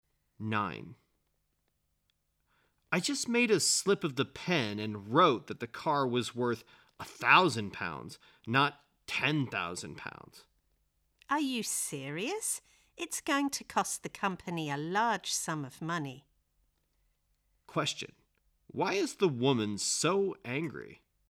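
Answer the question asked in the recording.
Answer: The man wrote the wrong value of the car, which will cost the company a lot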